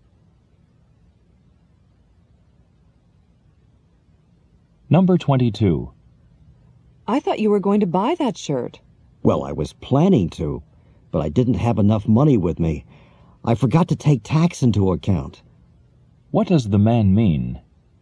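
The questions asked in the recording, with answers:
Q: What does the man mean?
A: He didn't buy the shirt because, with the tax, he didn't have enough money.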